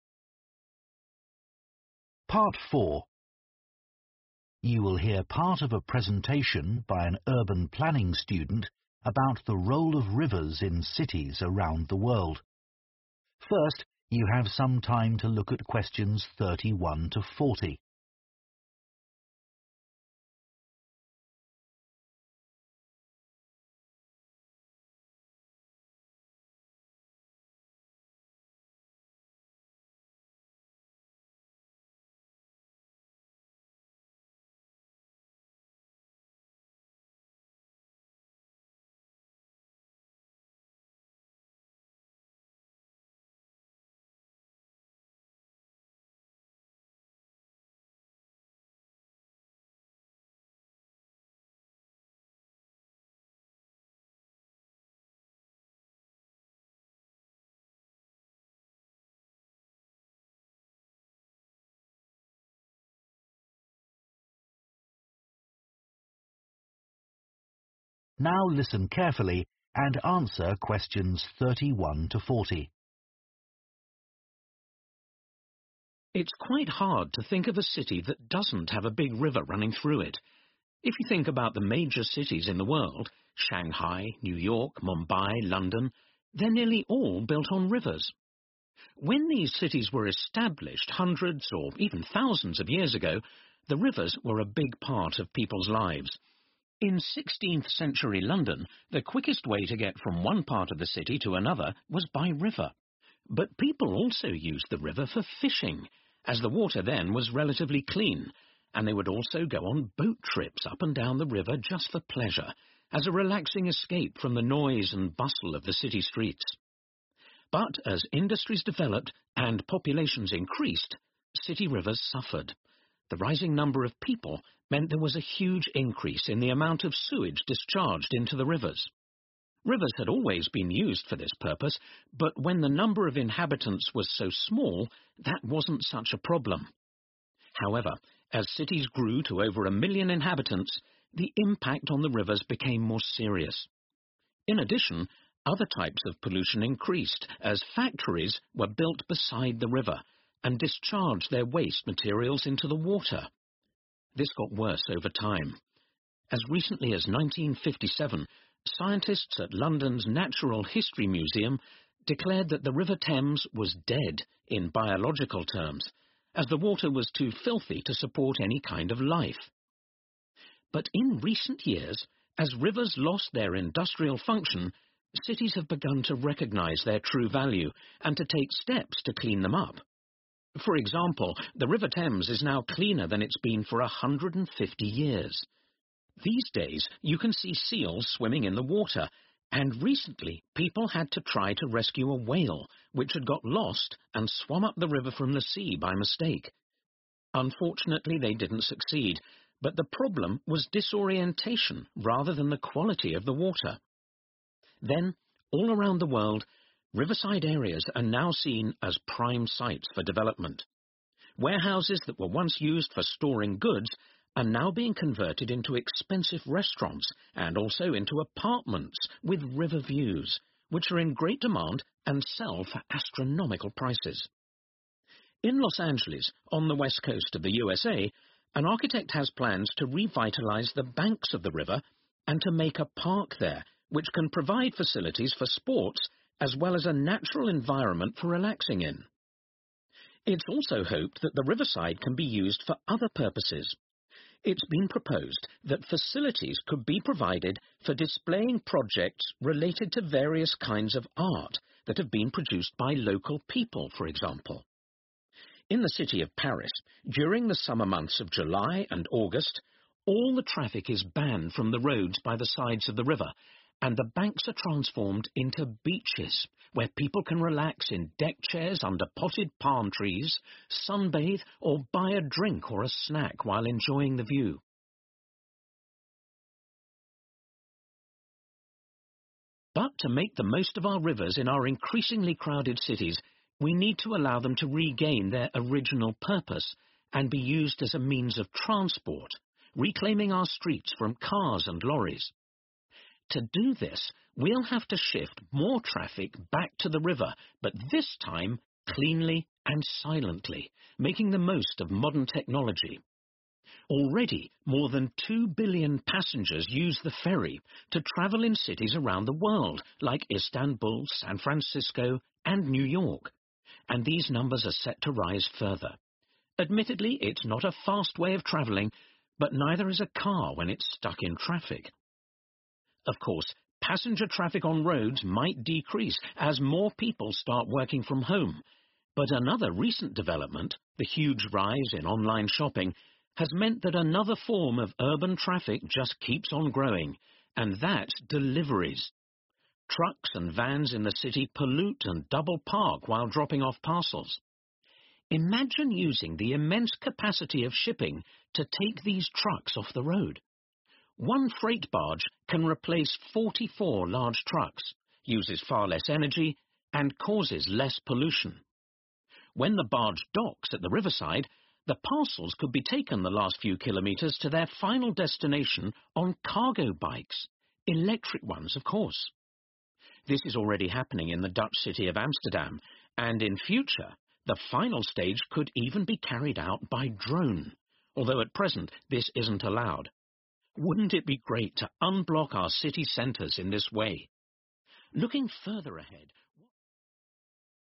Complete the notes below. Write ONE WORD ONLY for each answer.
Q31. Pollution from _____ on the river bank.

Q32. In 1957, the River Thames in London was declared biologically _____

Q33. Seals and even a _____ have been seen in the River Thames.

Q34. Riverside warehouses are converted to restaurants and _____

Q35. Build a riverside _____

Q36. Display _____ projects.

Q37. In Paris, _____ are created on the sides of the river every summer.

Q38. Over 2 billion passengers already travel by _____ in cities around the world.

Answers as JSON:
{"31": "Factories", "32": "Dead", "33": "Whale", "34": "Apartments", "35": "Park", "36": "Art", "37": "Beaches", "38": "Ferry"}

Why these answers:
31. The correct answer is 'factories' because the transcript mentions that as cities grew, more factories were built next to the rivers and they discharged pollution into the water. This caused a lot of problems for the rivers, increasing the pollution they faced.
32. The correct answer is 'dead' because in 1957, scientists said that the River Thames was 'dead in biological terms', which means it was too dirty to have any living creatures in it. This shows that pollution from sewage and industry had made the water very dirty and lifeless.
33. The correct answer is 'whale' because the transcript mentions that recently a whale swam up the River Thames by mistake. This shows that the river is cleaner and can now support life, including a whale.
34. The correct answer is 'Apartments' because the transcript mentions that riverside warehouses, which were used for storing goods, are now being turned into expensive restaurants and also into apartments. This shows the new purpose of these buildings near the river.
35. The correct answer is 'Park' because the transcript mentions that in Los Angeles, there are plans to make a park by the river. This will provide space for sports and a natural place to relax. Parks are important for enjoying nature in busy cities.
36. The correct answer is 'Art' because the transcript mentions that there are plans to show projects related to various kinds of art created by local people along the riverside areas. This shows that art is an important part of the developments around the rivers.
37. The correct answer is 'beaches' because during the summer months in Paris, they turn the roads beside the river into beaches so that people can relax. This means that instead of driving, people can enjoy the river area like a beach, with deck chairs and palm trees.
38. The correct answer is 'ferry' because the transcript mentions that more than two billion passengers use the ferry to travel in cities around the world, like Istanbul, San Francisco, and New York. Ferries are a popular mode of transport on rivers, helping to reduce traffic on the roads.

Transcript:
It's quite hard to think of a city that doesn't have a big river running through it. If you think about the major cities in the world, Shanghai, New York, Mumbai, London, they're nearly all built on rivers. When these cities were established hundreds or even thousands of years ago, the rivers were a big part of people's lives. In 16th century London, the quickest way to get from one part of the city to another was by river. But people also used the river for fishing, as the water then was relatively clean, and they would also go on boat trips up and down the river just for pleasure, as a relaxing escape from the noise and bustle of the city streets But as industries developed and populations increased city rivers suffered The rising number of people meant there was a huge increase in the amount of sewage discharged into the rivers. Rivers had always been used for this purpose, but when the number of inhabitants was so small, that wasn't such a problem. However, as cities grew to over a million inhabitants, the impact on the rivers became more serious. In addition, other types of pollution increased, as factories were built beside the river and discharged their waste materials into the water. This got worse over time. As recently as 1957, scientists at London's Natural History Museum declared that the River Thames was dead in biological terms, as the water was too filthy to support any kind of life. But in recent years, as rivers lost their industrial function, cities have begun to recognise their true value and to take steps to clean them up. For example, the River Thames is now cleaner than it's been for 150 years. These days you can see seals swimming in the water, and recently people had to try to rescue a whale, which had got lost and swum up the river from the sea by mistake. Unfortunately, they didn't succeed, but the problem was disorientation rather than the quality of the water. Then, all around the world, riverside areas are now seen as prime sites for development. Warehouses that were once used for storing goods are now being converted into expensive restaurants and also into apartments with river views, which are in great demand and sell for astronomical prices. In Los Angeles, on the west coast of the USA, an architect has plans to revitalise the banks of the river and to make a park there which can provide facilities for sports as well as a natural environment for relaxing in It also hoped that the riverside can be used for other purposes It's been proposed that facilities could be provided for displaying projects related to various kinds of art that have been produced by local people, for example. In the city of Paris, During the summer months of July and August, all the traffic is banned from the roads by the sides of the river, and the banks are transformed into beaches, where people can relax in deck chairs under potted palm trees, sunbathe or buy a drink or a snack while enjoying the view. But to make the most of our rivers in our increasingly crowded cities, we need to allow them to regain their original purpose and be used as a means of transport, reclaiming our streets from cars and lorries. To do this, we'll have to shift more traffic back to the river, but this time cleanly and silently, making the most of modern technology. Already, more than two billion passengers use the ferry to travel in cities around the world, like Istanbul, San Francisco and New York, and these numbers are set to rise further. Admittedly, it's not a fast way of travelling, but neither is a car when it's stuck in traffic. Of course, passenger traffic on roads might decrease as more people start working from home, but another recent development, the huge rise in online shopping, has meant that another form of urban traffic just keeps on growing, and that's deliveries. Trucks and vans in the city pollute and double-park while dropping off parcels. Imagine using the immense capacity of shipping to take these trucks off the road One freight barge can replace 44 large trucks uses far less energy and causes less pollution When the barge docks at the riverside the parcels could be taken the last few kilometres to their final destination on cargo bikes, electric ones of course. This is already happening in the Dutch city of Amsterdam, and in future the final stage could even be carried out by drone, although at present this isn't allowed. Wouldn't it be great to unblock our city centres in this way? Looking further ahead...